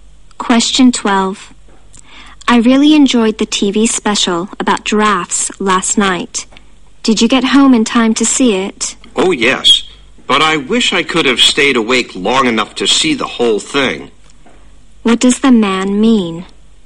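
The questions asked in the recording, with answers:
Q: What does the man mean?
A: He fell asleep before the TV special ended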